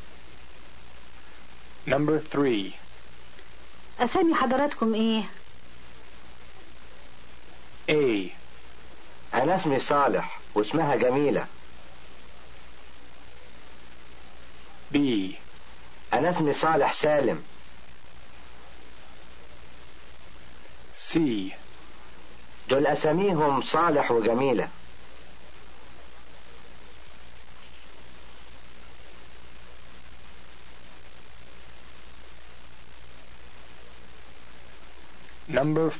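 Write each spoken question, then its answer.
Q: اسامي حضراتكم ايه؟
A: A: أنا اسمي صالح واسمها جميلة.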